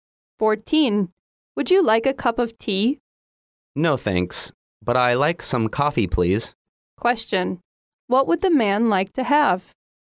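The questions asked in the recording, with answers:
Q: What would the man like to have?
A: Coffee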